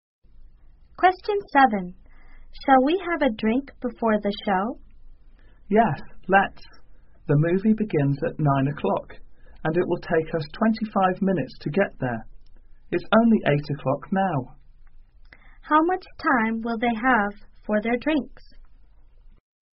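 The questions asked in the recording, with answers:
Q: How much time will they have for their drinks?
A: 35 minutes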